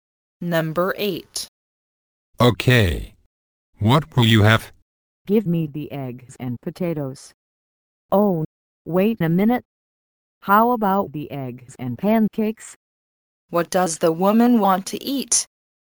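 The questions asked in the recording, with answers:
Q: What does the woman want to eat?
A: Eggs and pancakes.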